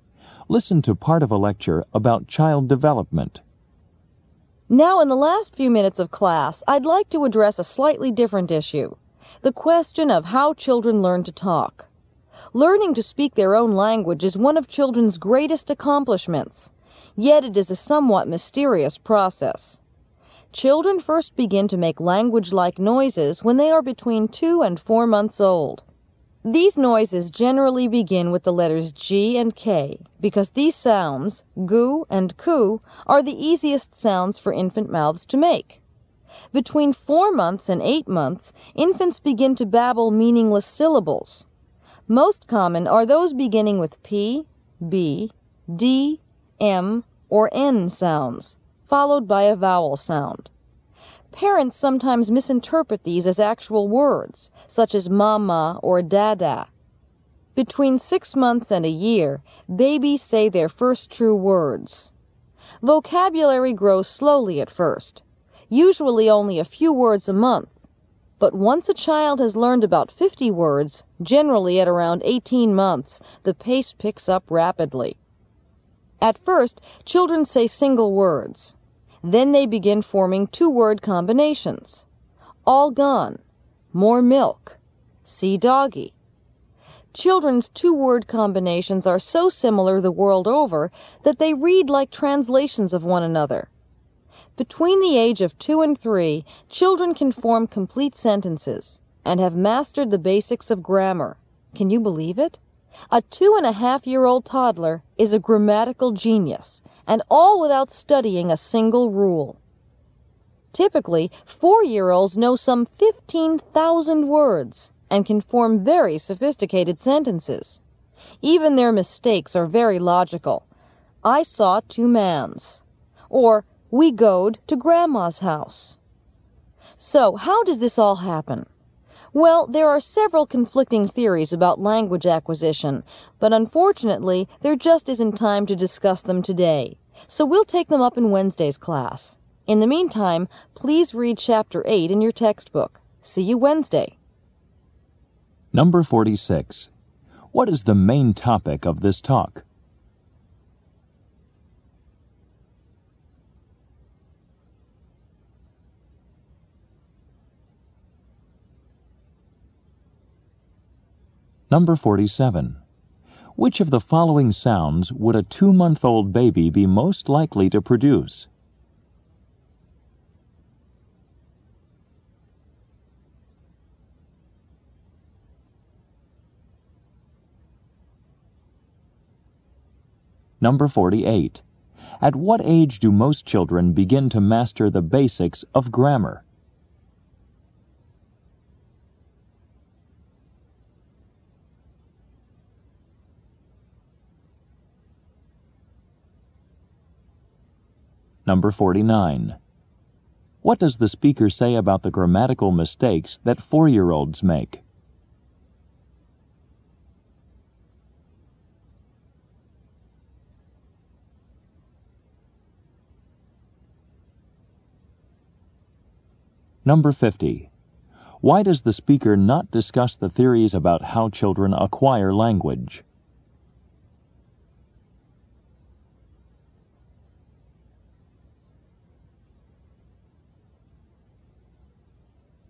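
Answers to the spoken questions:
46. How children learn to talk
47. Sounds beginning with G or K, like gu or ku
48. Between 2 and 3
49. They are very logical
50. There isn't enough time; they will be discussed on Wednesday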